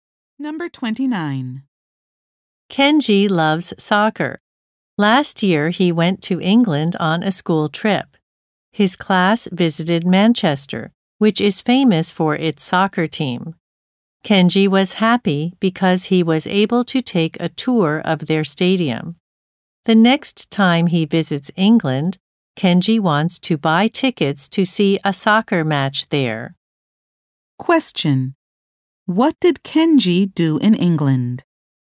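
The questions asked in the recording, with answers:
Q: What did Kenji do in England?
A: He took a tour of the soccer stadium in Manchester.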